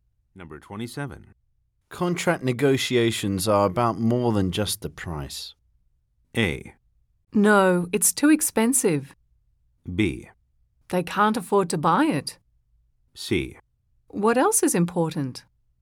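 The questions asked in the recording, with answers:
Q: Contract negotiations are about more than just the price.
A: C: What else is important?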